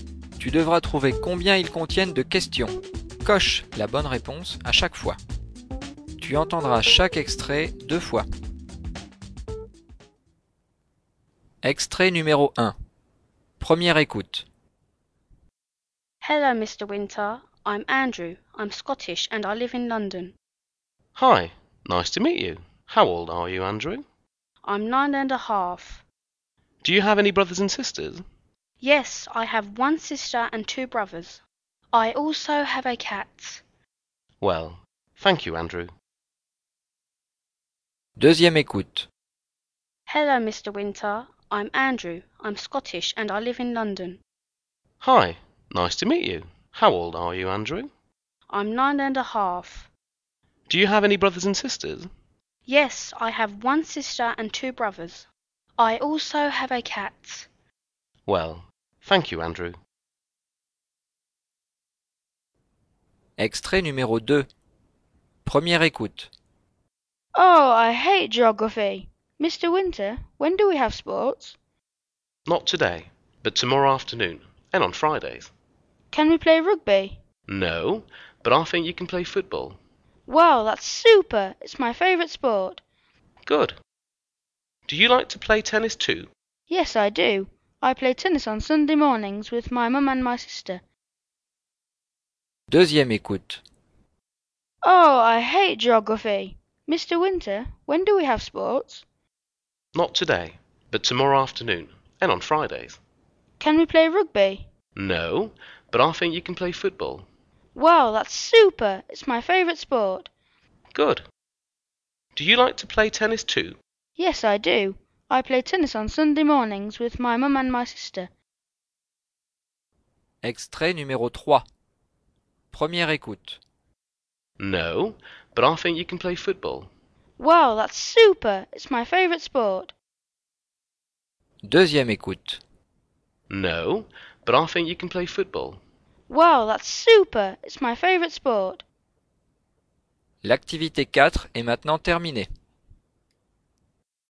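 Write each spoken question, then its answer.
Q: Tu devras trouver combien ils contiennent de questions.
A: 2 questions

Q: Tu devras trouver combien ils contiennent de questions.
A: 3 questions

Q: Tu devras trouver combien ils contiennent de questions.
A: 0 question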